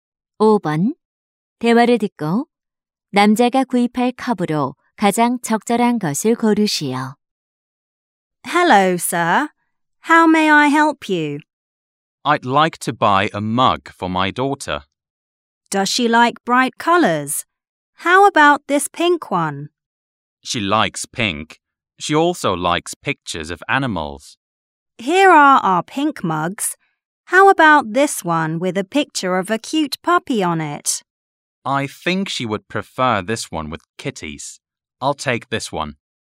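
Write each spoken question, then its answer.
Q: 대화를 듣고 남자가 구입할 컵으로 가장 적절한 것을 고르시오.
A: 고양이 그림이 있는 분홍색 머그컵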